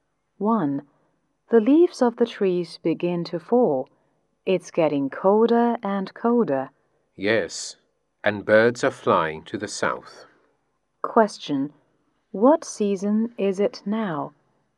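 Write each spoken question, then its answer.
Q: What season is it now?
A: Autumn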